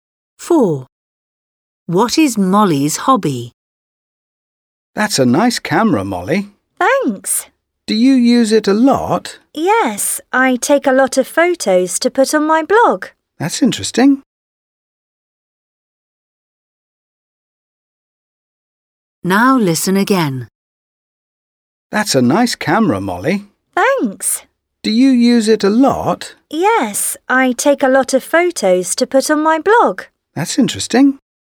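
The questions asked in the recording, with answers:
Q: What is Molly's hobby?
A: taking photos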